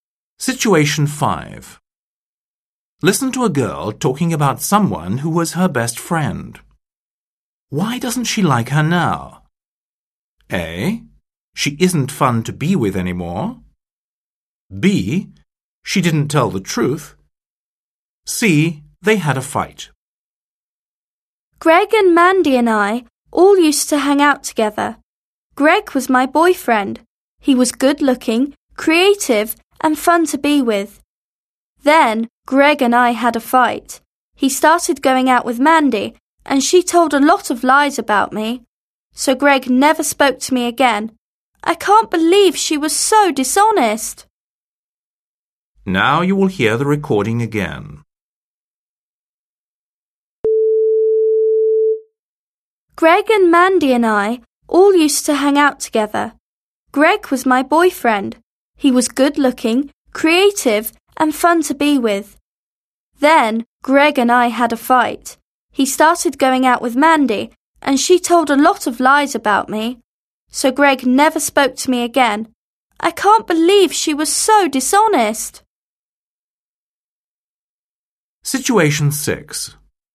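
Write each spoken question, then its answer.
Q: Why doesn't she like her now?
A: B: She didn't tell the truth.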